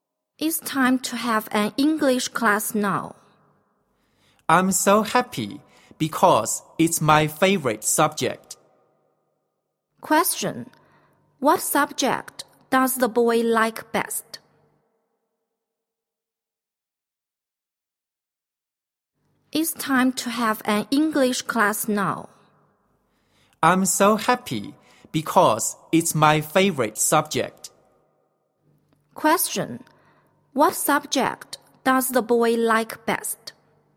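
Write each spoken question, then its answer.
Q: What subject does the boy like best?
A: English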